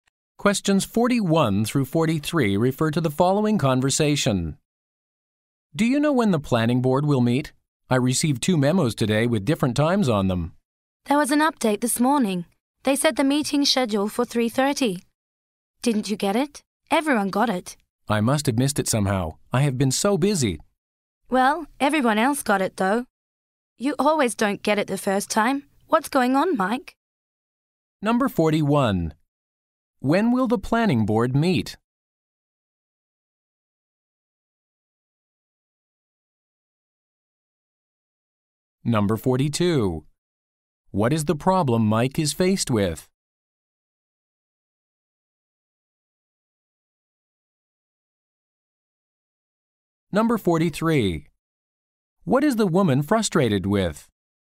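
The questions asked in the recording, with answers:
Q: When will the planning board meet?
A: At 3:30

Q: What is the problem Mike is faced with?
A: He missed the update about the meeting time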